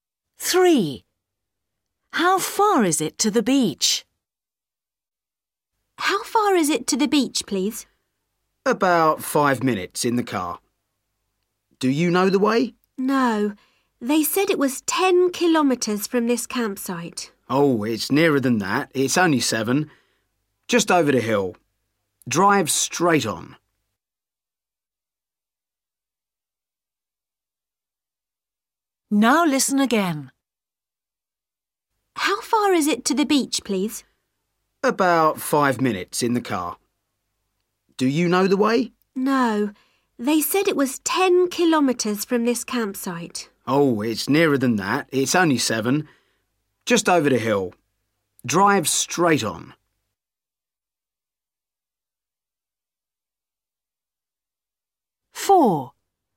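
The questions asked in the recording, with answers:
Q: How far is it to the beach?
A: 7 kilometres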